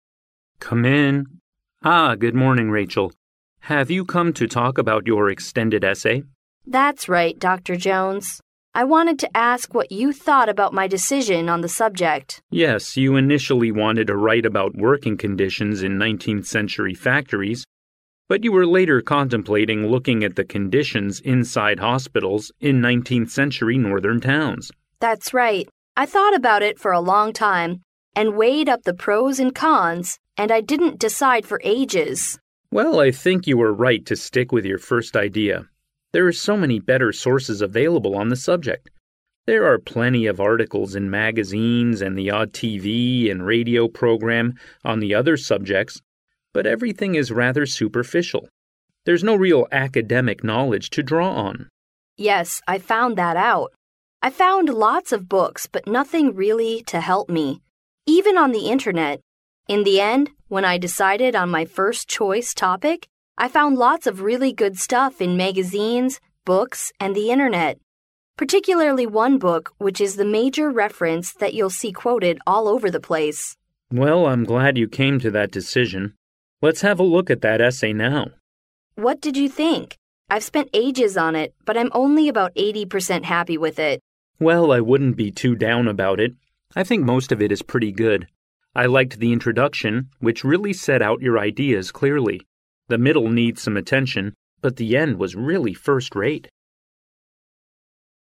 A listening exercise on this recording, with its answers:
Conversation One Listen to the conversation, mark each statement as either true (T) or false (F) according to your listening.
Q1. Rachel came to see Dr. Jones because Dr. Jones needs her further explanation of an extension for her essay.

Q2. The working conditions of hospitals in 19th century was Rachel's decision on her topic of the essay.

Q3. Rachel chose the topic at last because there're lots of sources that she can refer to.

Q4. Dr. Jones thought Rachel's essay was only 80 percent completed.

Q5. Dr. Jones appreciated the end of Rachel's essay.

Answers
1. 错
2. 错
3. 对
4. 错
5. 对

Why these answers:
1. 题目中Rachel讲到"I wanted to ask what you thought about my decision on the subject."由此可见,为了询问老师对于论文选题的看法,是Rachel主动找的Dr. Jones,而不是Dr. Jones想听Rachel进一步的解释。因此,该判断错误。
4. 根据录音内容,"I've spent ages on it but I'm only about 80 percent happy with it."Rachel自身并不是100%绝对满意,意思是说自我满意度只有80%,而不是只完成了80%的内容。因此,该判断错误。
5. 根据录音内容,老师评论"the end was really first rate","first rate"是"一流的,最好的"意思。由此可见,Dr Jones认为最后的结尾是"一流的,最好的"。因此,该判断正确。

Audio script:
[听力原文] M: Come in. Ah, good morning, Rachel. Have you come to talk about your extended essay? W: That's right Dr. Jones. I wanted to ask what you thought about my decision on the subject. M: Yes, you initially wanted to write about working conditions in 19th century factories but you were later contemplating looking at the conditions inside hospitals in 19th century northern towns. W: That's right. I thought about it for a long time and weighed up the pros and cons and I didn't decide for ages. M: Well, I think you were right to stick with your first idea. There're so many better sources available on the subject. There are plenty of articles in magazines and the odd TV and radio programme on the other subjects but everything is rather superficial; there's no real academic knowledge to draw on. W: Yes, I found that out. I found lots of books but nothing really to help me; even on the internet. In the end, when I decided on my first choice topic I found lots of really good stuff in magazines, books and the internet. Particularly one book which is the major reference that you'll see quoted all over the place. M: Well, I'm glad you came to that decision. Let's have a look at that essay now. W: What did you think? I've spent ages on it but I'm only about 80 percent happy with it. M: Well, I wouldn't be too down about it. I think most of it is pretty good. I liked the introduction which really set out your ideas clearly. The middle needs some attention but the end was really first rate.